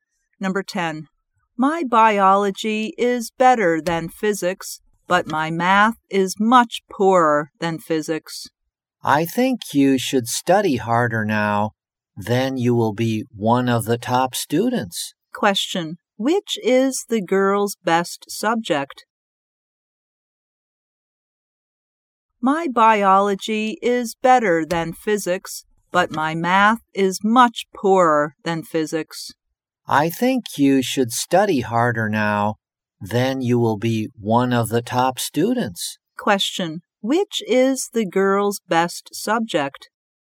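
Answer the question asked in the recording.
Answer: Biology.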